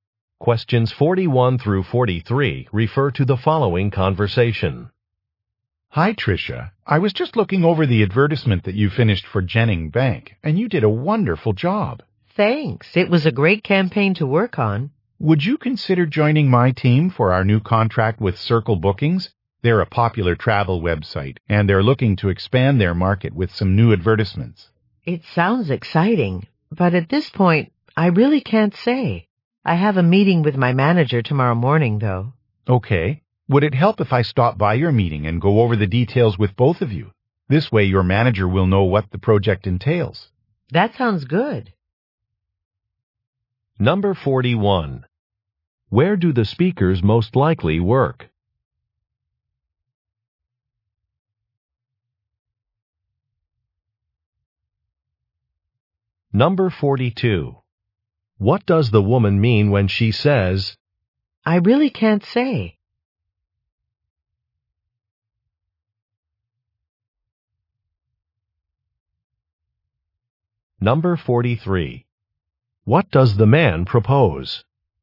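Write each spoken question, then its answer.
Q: Where do the speakers most likely work?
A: At an advertising agency

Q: What does the woman mean when she says,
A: She can't decide yet; she must talk to her manager first

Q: What does the man propose?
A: Coming to her meeting to explain the project to her manager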